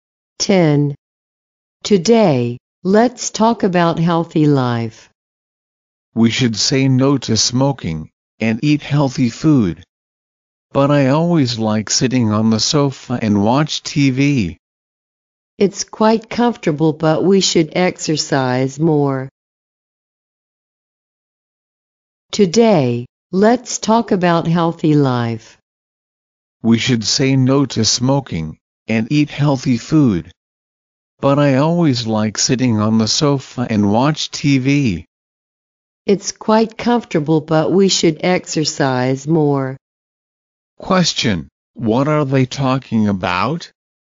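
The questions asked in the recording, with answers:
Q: Question: What are they talking about?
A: Healthy life.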